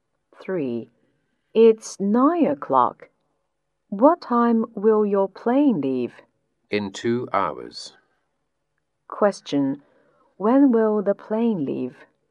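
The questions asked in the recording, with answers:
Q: When will the plane leave?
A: At 11 o'clock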